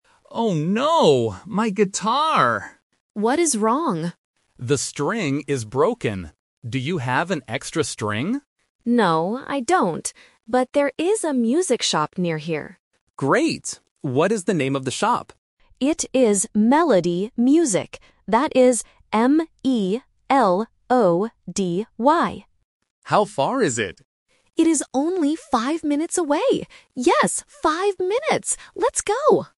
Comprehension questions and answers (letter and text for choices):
Listen to two friends practicing music and choose the correct answer (A, B, or C) for each question.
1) What is broken?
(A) The guitar string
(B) The music shop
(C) The drum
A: (A) The guitar string

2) What is the name of the music shop?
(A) Melodi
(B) Medoly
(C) Melody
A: (C) Melody

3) How far is the music shop?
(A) Fifteen minutes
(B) Five minutes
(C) Fifty minutes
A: (B) Five minutes

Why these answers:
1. The man explicitly says, "The string is broken." Option (B) "The music shop" is a trap because the shop is mentioned right after, but it is not broken. Option (C) "The drum" is a plausible musical instrument but is not mentioned at all.
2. The woman spells the shop's name clearly out loud: "That is M-E-L-O-D-Y." Option (A) "Melodi" and Option (B) "Medoly" are traps because they sound very similar and have almost the same letters, testing the listener's spelling recognition.
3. The woman states and repeats the distance: "It is only five minutes away. Yes, five minutes!" Option (A) "Fifteen minutes" and Option (C) "Fifty minutes" are classic A1 phonetic traps, as "five", "fifteen", and "fifty" are easily confused by beginners.